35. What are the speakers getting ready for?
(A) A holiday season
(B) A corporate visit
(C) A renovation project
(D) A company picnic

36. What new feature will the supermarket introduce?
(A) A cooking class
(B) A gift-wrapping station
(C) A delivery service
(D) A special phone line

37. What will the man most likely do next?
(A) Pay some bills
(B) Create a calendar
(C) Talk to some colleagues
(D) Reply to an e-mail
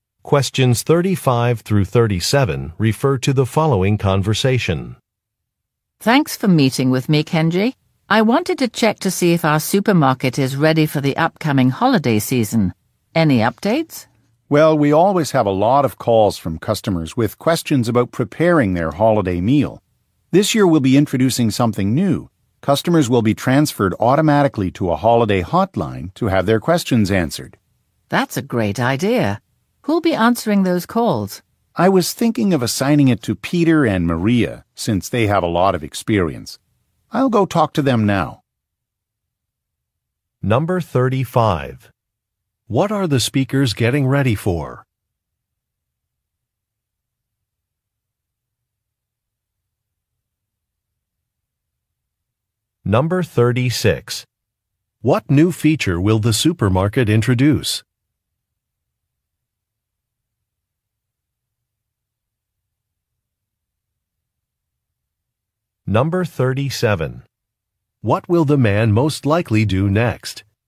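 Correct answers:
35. A
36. D
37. C

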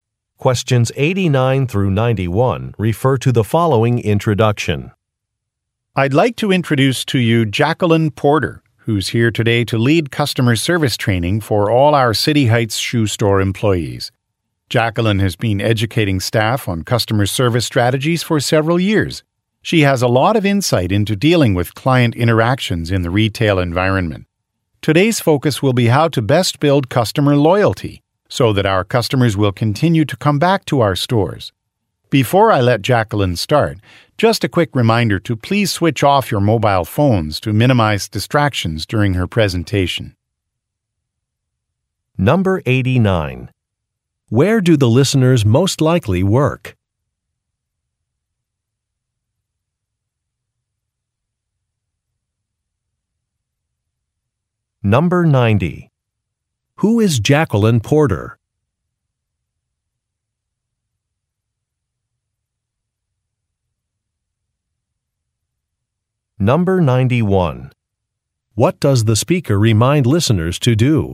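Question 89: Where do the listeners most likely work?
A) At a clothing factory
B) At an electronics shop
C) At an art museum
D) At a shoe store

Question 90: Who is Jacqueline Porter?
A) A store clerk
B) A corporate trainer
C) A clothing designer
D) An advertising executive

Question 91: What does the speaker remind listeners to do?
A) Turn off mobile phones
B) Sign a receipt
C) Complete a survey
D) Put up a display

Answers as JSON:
{"89": "D", "90": "B", "91": "A"}

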